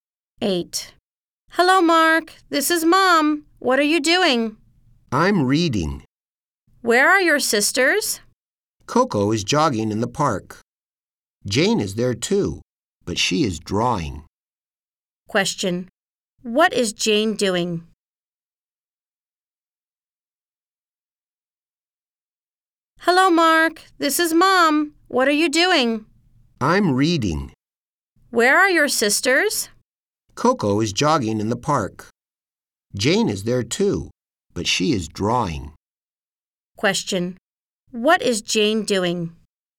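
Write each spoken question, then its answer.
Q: What is Jane doing?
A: Drawing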